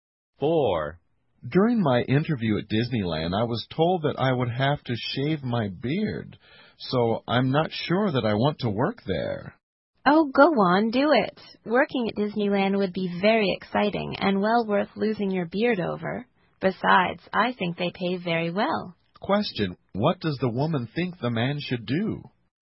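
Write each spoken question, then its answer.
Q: what does the woman think the man should do?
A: Shave his beard and take the job at Disneyland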